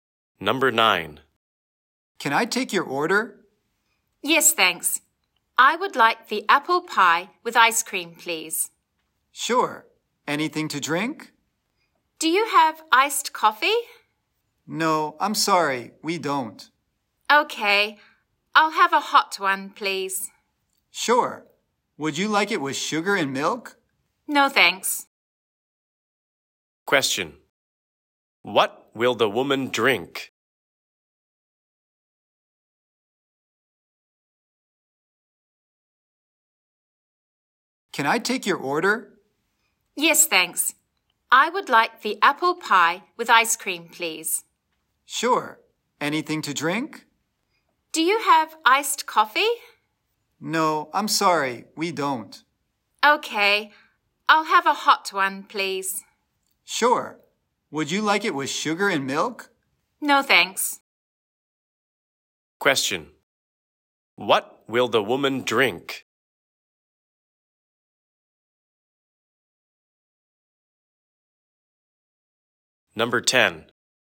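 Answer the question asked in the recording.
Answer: Hot coffee without sugar or milk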